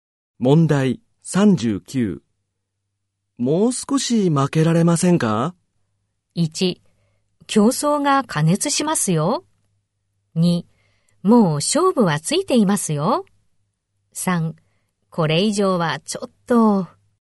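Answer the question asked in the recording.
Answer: 3: これ以上はちょっと。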